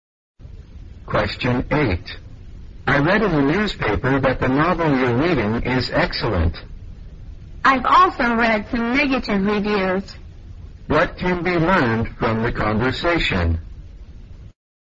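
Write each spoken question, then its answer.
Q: What can be learned from the conversation?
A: The novel has received both good and bad reviews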